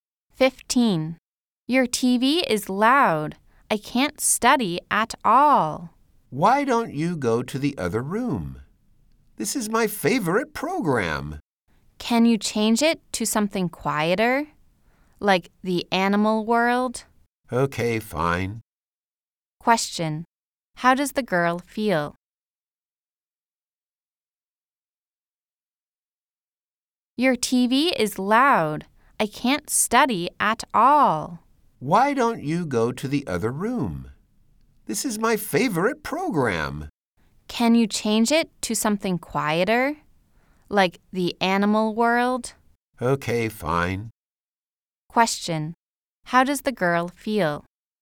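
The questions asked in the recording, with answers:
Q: How does the girl feel?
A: Annoyed by the loud TV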